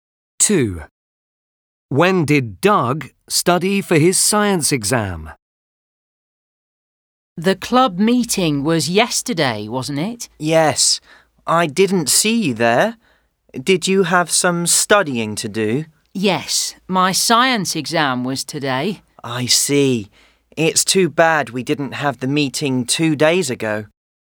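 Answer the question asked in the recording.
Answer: Yesterday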